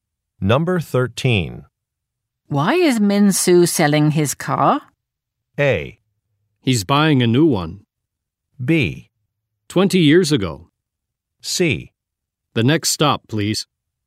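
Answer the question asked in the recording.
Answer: A: He's buying a new one.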